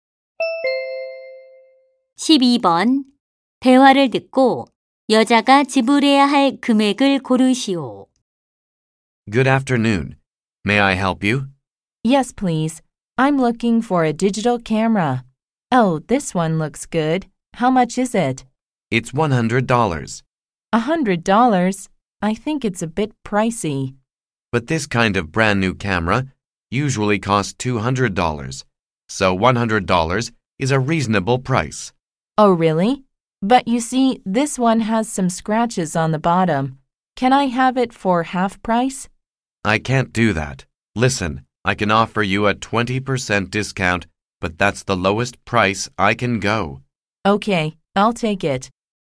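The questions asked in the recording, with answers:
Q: 대화를 듣고 여자가 지불해야 할 금액을 고르시오.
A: 80달러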